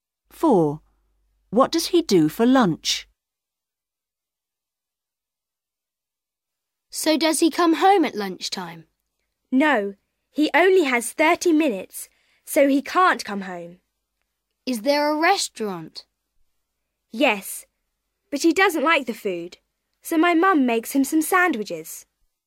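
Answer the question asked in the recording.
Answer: He eats sandwiches his mum makes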